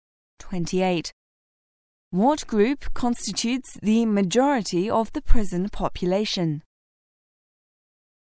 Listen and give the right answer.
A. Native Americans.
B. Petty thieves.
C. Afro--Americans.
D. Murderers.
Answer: C. Afro--Americans.